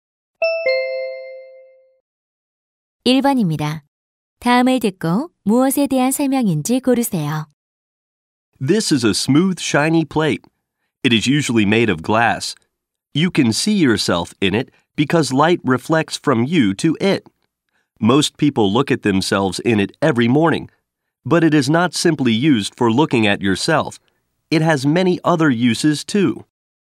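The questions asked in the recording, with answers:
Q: 다음을 듣고 무엇에 대한 설명인지 고르세요.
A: 거울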